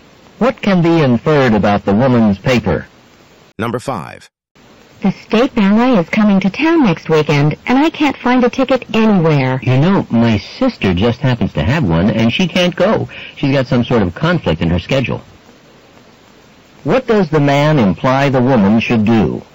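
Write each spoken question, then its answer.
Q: What does the man imply the woman should do?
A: Ask his sister about buying her ticket.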